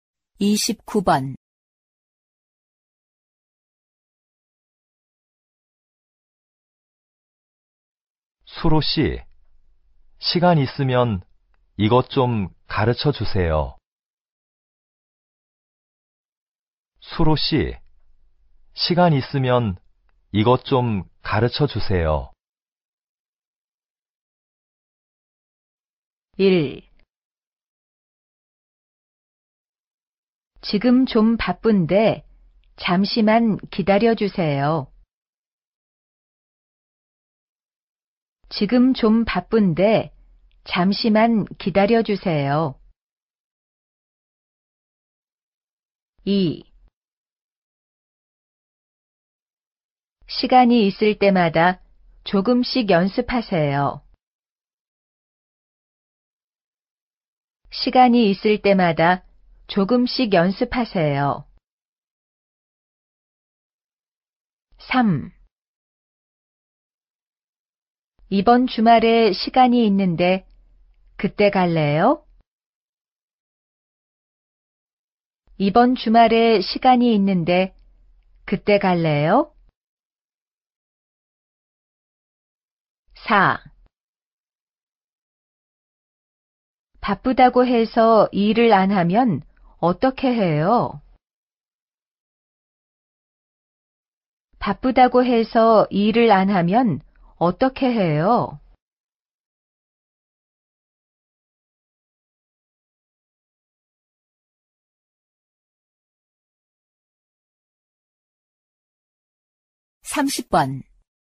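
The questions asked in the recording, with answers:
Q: 수로 씨, 시간 있으면 이것 좀 가르쳐 주세요.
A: 1: 지금 좀 바쁜데 잠시만 기다려 주세요.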